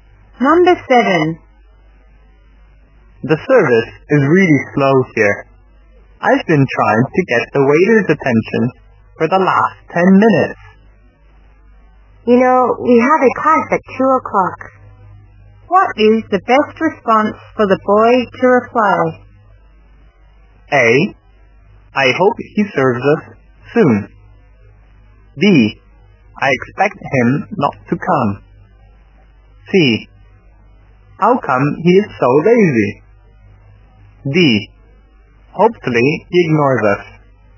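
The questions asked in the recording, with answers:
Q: What is the best response for the boy to reply?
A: A: I hope he serves us soon.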